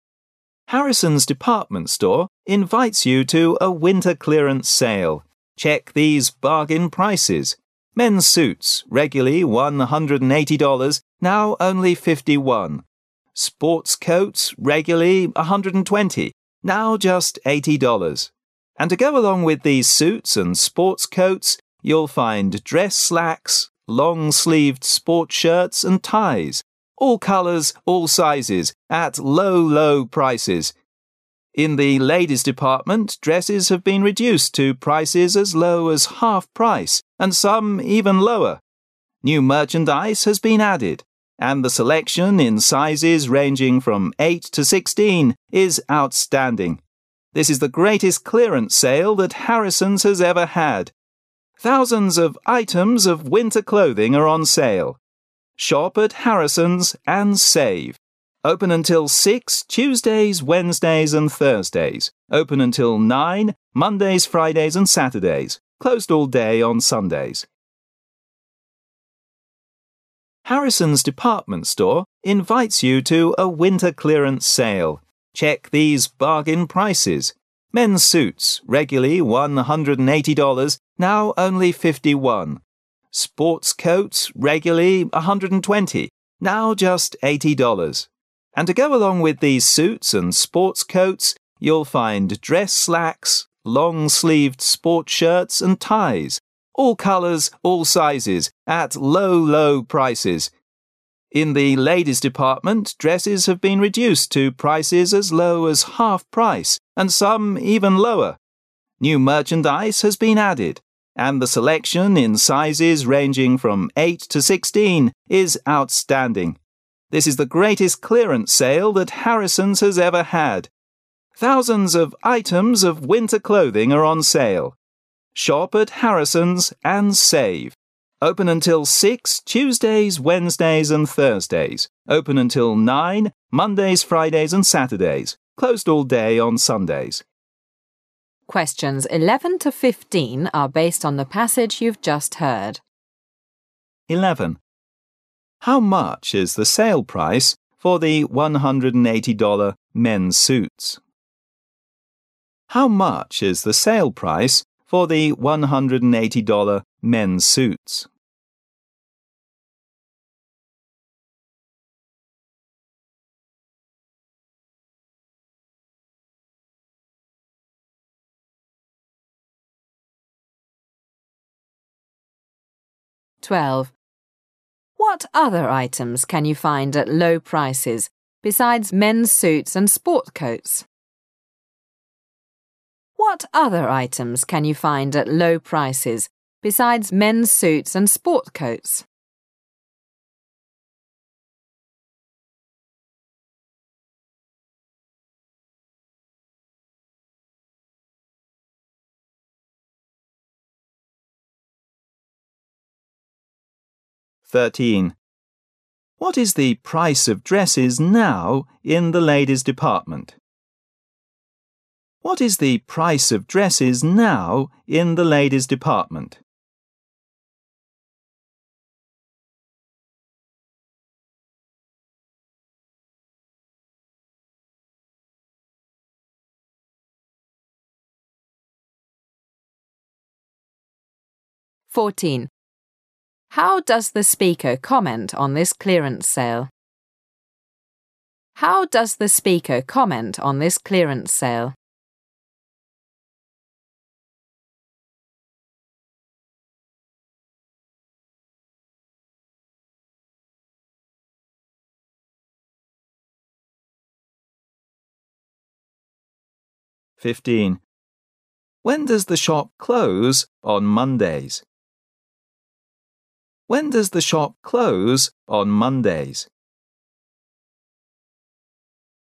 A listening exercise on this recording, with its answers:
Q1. How much is the sale price for the 180-dollar men's suits?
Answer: 51

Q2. What other items can you find at low prices beside men's suits and sport coats? You'll find dress slacks, long-sleeved sport ______of all colors and all sizes.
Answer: shirts and ties

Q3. What is the price of dresses now in the ladies department? It's as low as______.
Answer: half price

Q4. How does the speaker comment this clearance sale? This is______. that Harrison's has ever had.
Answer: the greatest

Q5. When does the shop close on Mondays?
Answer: At 9/nine

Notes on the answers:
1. 11-15 Harrison's Department Store invites you to a winter clearance sale. Check these bargain prices: men's suits regularly $180,now only 51 ;sport coats regularly 120,now just 80 dollars. And to go along with these suits and sport coats, you'll find dress slacks, long-sleeved sport shirts and ties, all colors, all sizes, at low prices. In the ladies' department, dresses have been reduced to prices as low as half price and some lower. New merchandise has been added, and the selection in sizes eight sixteen is outstanding. This is the greatest clearance sale that Harrison' s has ever had. Thousands of times of winter clothing are on sale. Shop at Harrison's and save. Open until Tuesdays, Wednesdays, and Thursdays. Open until nine Mondays, Fridays and Saturdays. Closed all day on Sundays. 11. How much is the sale price for the 180 -dollar men's suits?